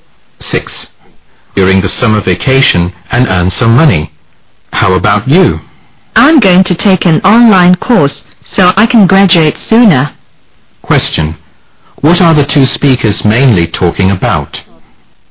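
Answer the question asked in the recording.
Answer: Their plans for the summer vacation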